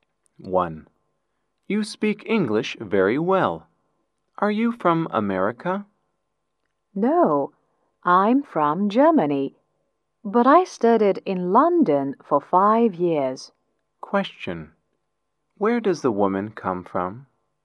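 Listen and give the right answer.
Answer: Germany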